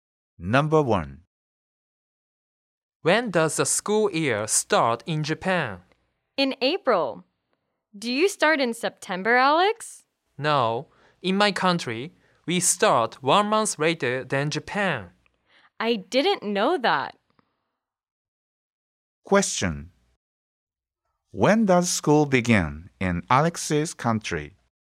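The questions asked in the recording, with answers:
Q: When does school begin in Alex's country?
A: In May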